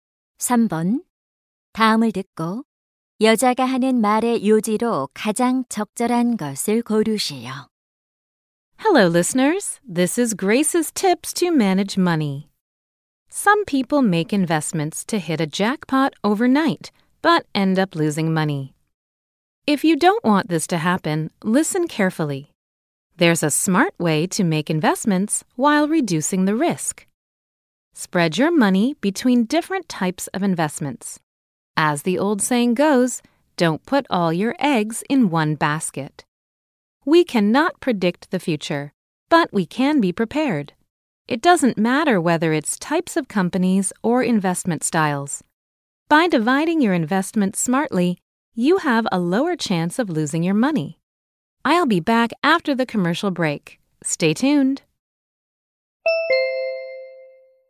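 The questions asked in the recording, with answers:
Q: 다음을 듣고 여자가 하는 말의 요지로 가장 적절한 것을 고르시오.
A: 위험을 줄이려면 여러 종류에 분산 투자해야 한다.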